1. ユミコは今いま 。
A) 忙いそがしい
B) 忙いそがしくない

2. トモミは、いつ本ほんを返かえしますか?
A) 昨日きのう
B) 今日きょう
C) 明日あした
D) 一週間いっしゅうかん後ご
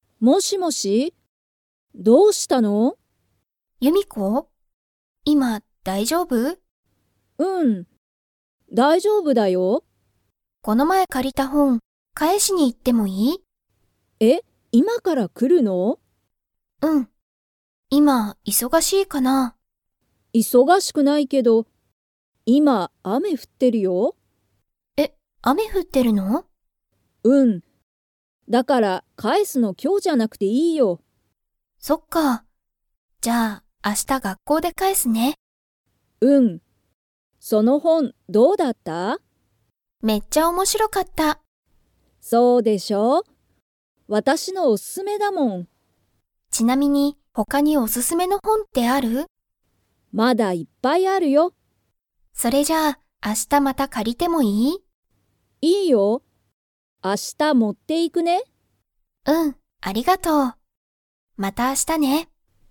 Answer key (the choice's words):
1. 忙いそがしくない
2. 明日あした

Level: Level 4